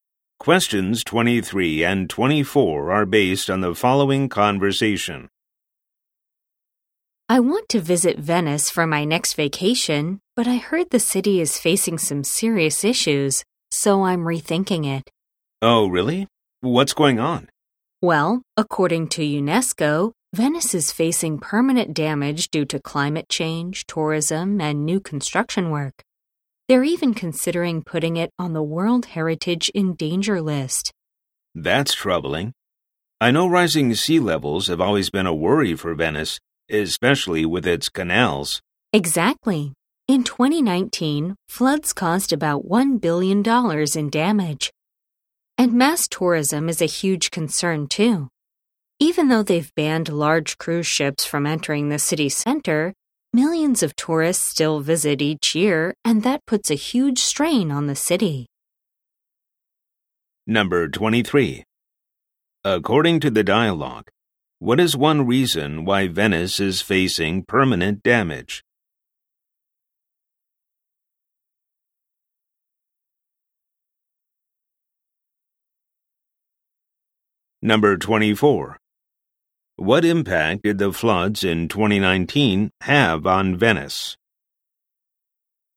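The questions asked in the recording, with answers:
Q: According to the dialogue, what is one reason why Venice is facing permanent damage?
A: Climate change, tourism, or new construction

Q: What impact did the floods in 2019 have on Venice?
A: About $1 billion in damage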